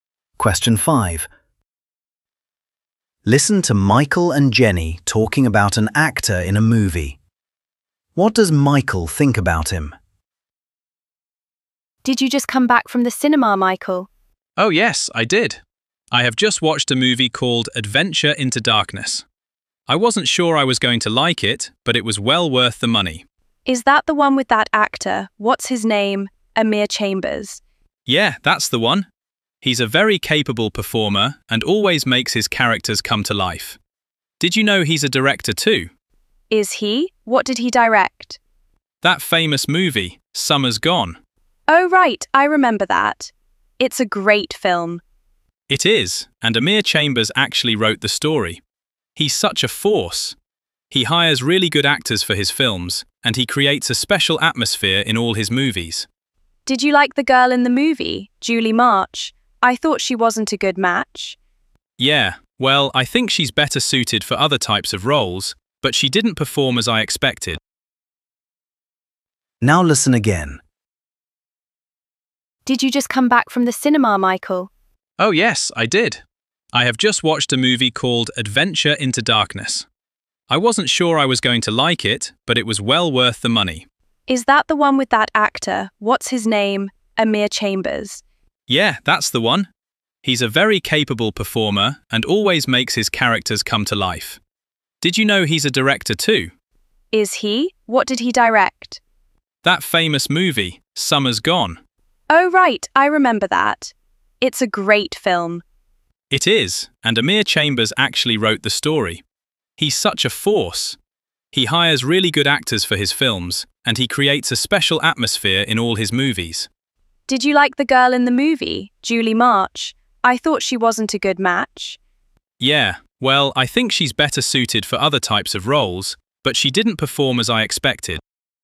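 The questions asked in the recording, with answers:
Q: What does Michael think about him?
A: He thinks he is a very capable performer who makes his characters come to life.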